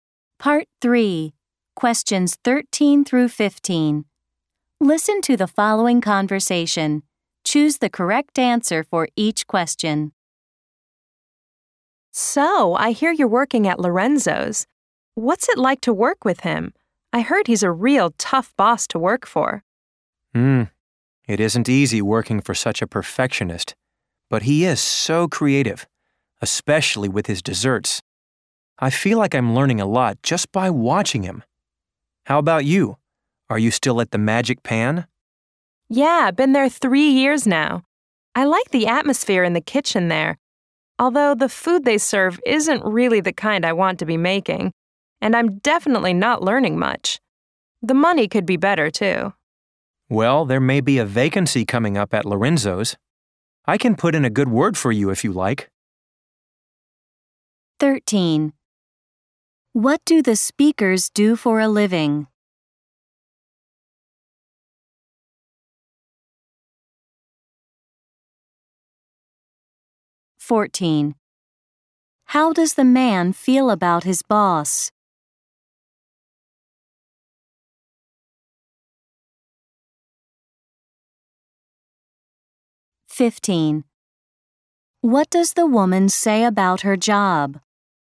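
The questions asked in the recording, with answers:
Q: What do the speakers do for a living?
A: They are cooks (chefs) in restaurants.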